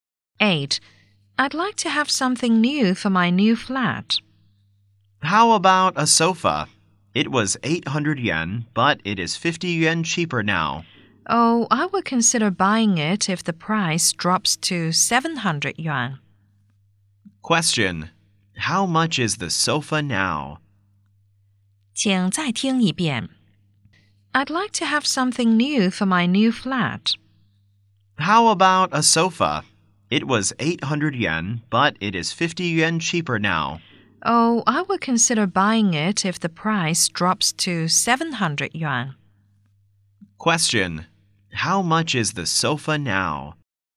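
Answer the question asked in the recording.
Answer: 750 yen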